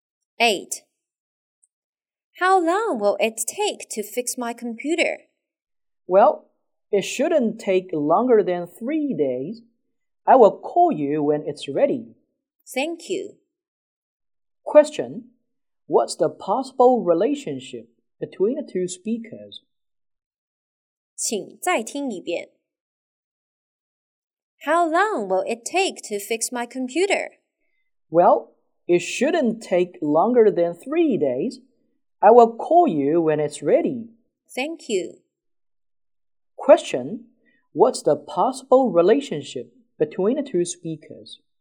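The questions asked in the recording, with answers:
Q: What's the possible relationship between the two speakers?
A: Customer and computer repairman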